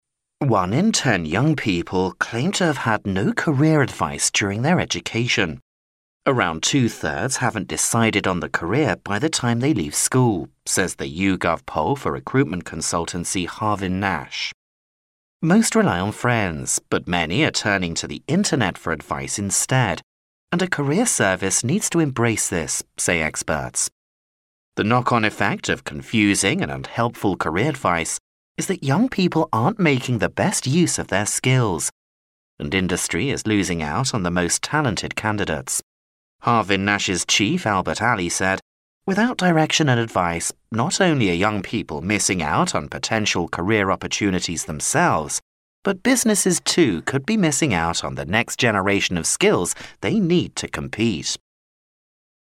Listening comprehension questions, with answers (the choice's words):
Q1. What's the main message of the news item?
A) Career service needs to be improved.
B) Career advice isn't offered on the Internet.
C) Businesses aren't getting talented people.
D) Young people should seek career advice.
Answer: Career service needs to be improved.

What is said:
"One in ten young people claim to have had no career advice during their education. Around two-thirds haven't decided on the career by the time they leave school," says the YouGov Poll for recruitment consultancy Harvin Nash. "Most rely on friends, but many are turning to the Internet for advice instead, and a career service needs to embrace this," say experts. The knock-on effect of confusing and unhelpful career advice is that young people aren't making the best use of their skills, and industry is losing out on the most talented candidates. Harvin Nash's chief Albert Alley said, "Without direction and advice, not only are young people missing out on potential career opportunities themselves, but businesses, too, could be missing out on the next generation of skills they need to compete."